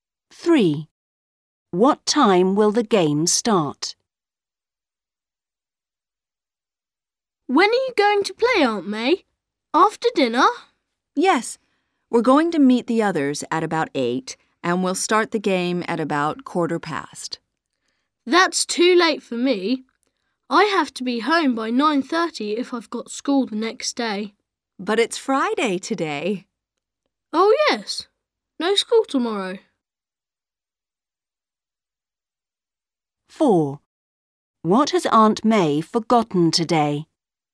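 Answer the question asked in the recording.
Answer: At about 8:15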